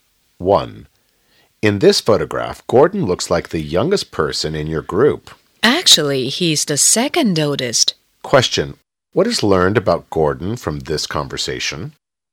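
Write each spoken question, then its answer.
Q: What is learned about Gordon from this conversation?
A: He is the second oldest in the group, though he looks the youngest.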